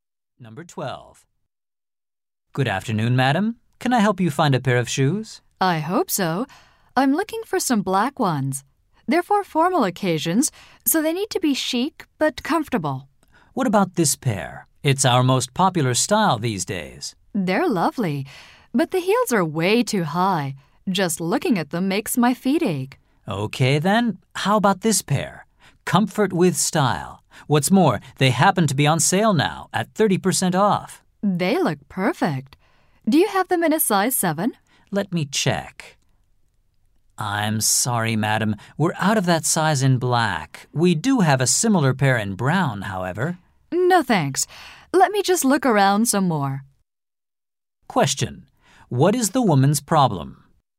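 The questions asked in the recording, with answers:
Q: What is the woman's problem?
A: The shoes she likes aren't available in her size in black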